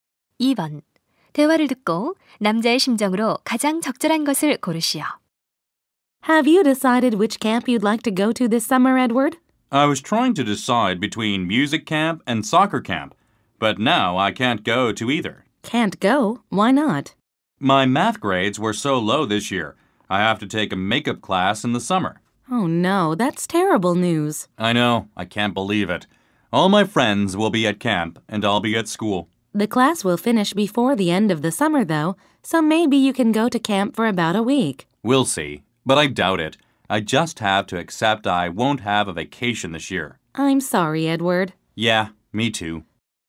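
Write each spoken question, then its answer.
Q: 대화를 듣고 남자의 심정으로 가장 적절한 것을 고르시오.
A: 실망스러움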